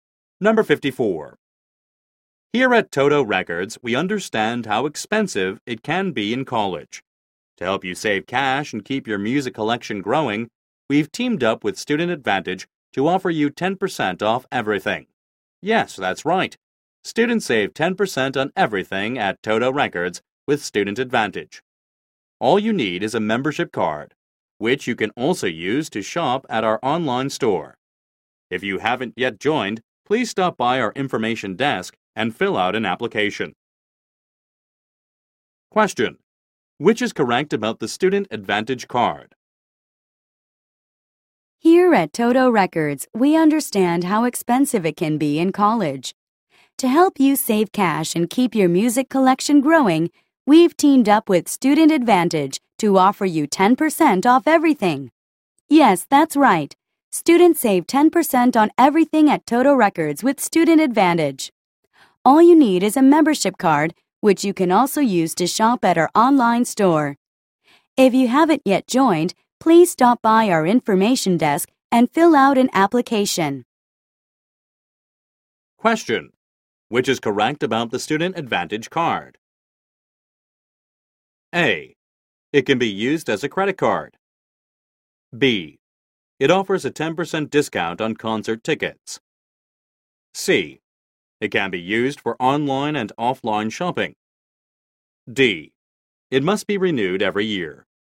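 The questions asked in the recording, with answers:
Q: Which is correct about the Student Advantage card?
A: C: It can be used for online and offline shopping.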